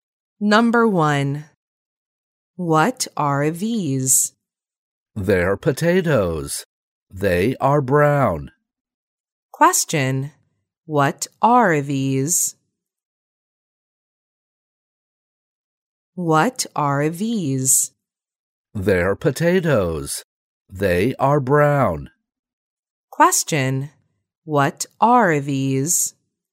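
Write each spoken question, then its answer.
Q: What are these?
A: They're potatoes.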